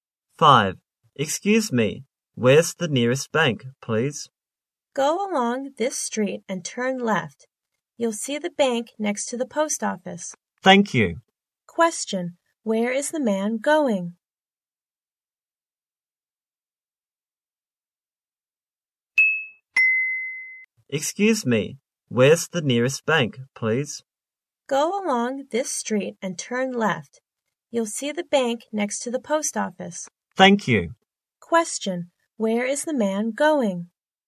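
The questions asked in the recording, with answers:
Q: Where is the man going?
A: To the bank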